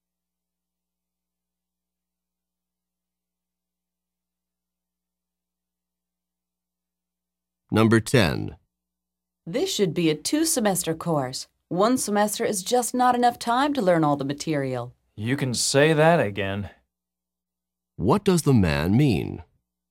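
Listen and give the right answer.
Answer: He agrees it should be a two-semester course.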